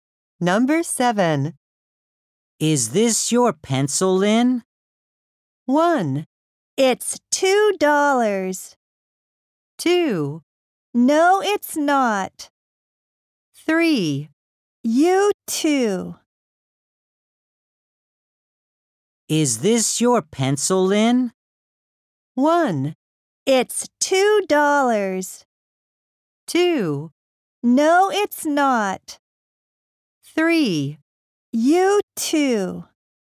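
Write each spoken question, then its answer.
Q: Is this your pencil, Lynn?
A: 2: No, it's not.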